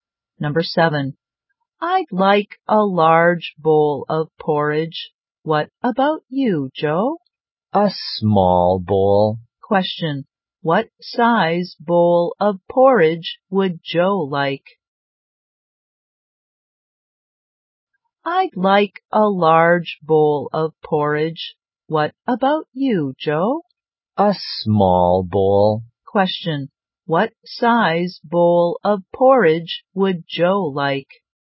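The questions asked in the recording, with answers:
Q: Question, what size bowl of porridge would Joe like?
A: A small bowl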